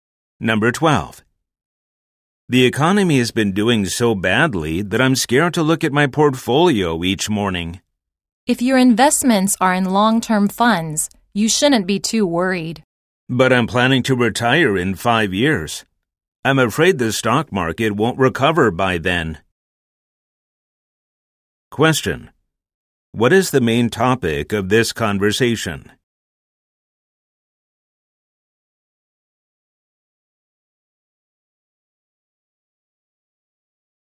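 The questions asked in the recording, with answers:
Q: What is the main topic of this conversation?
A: The stock market and investments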